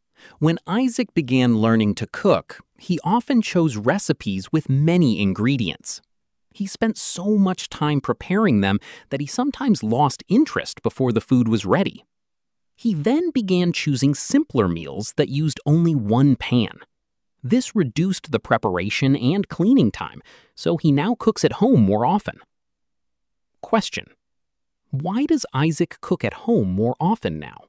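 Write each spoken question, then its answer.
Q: why does Isaac cook at home more often now?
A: He chooses simpler one-pan meals that take less time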